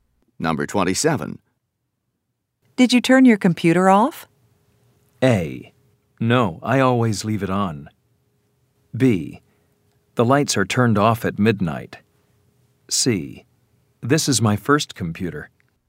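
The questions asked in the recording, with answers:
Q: Did you turn your computer off?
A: A: No, I always leave it on.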